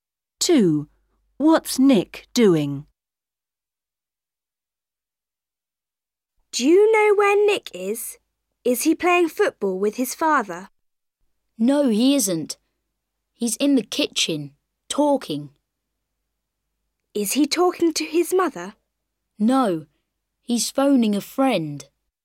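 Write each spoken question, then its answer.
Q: What's Nick doing?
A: phoning a friend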